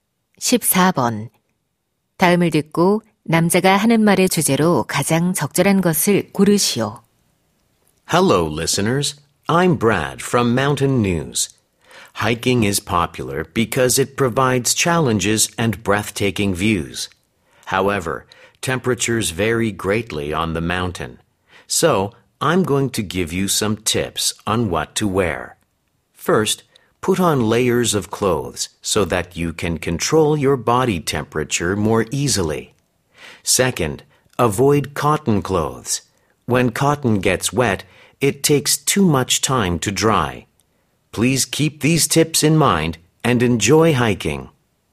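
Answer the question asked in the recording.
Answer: 등산할 때 입을 옷에 관한 조언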